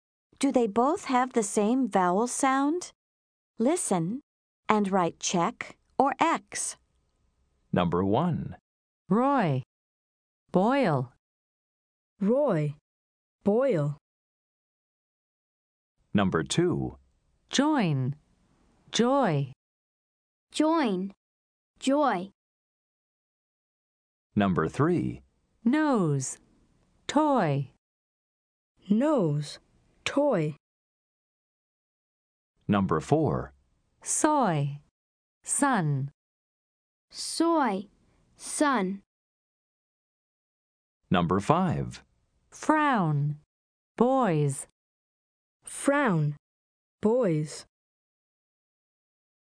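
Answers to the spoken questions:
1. Yes (Roy, Boyle)
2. Yes (Join, Joy)
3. No (Nose, Toy)
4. No (Soy, Sun)
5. No (Frown, Boys)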